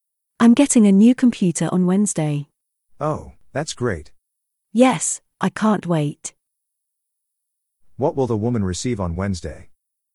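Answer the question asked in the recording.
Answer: A new computer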